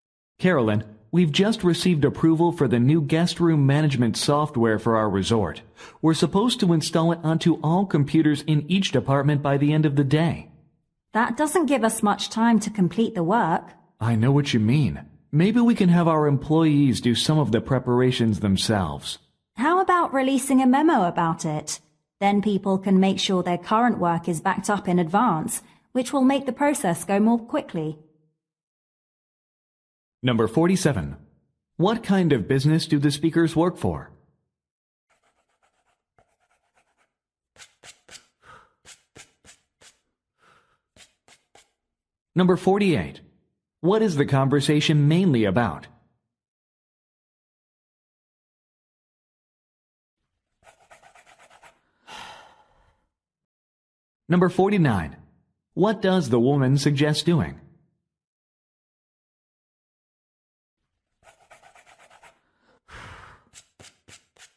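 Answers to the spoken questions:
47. A resort
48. Installing new guest room management software
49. Sending a memo so employees back up their work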